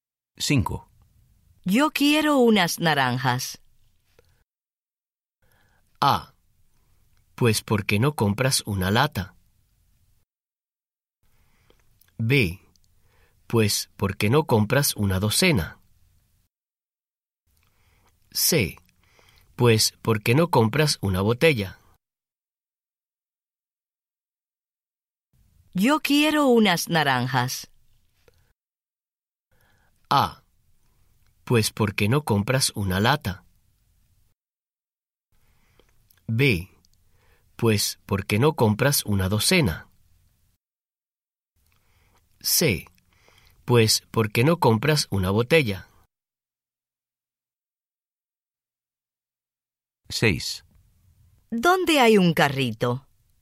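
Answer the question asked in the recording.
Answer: B: Pues, ¿por qué no compras una docena?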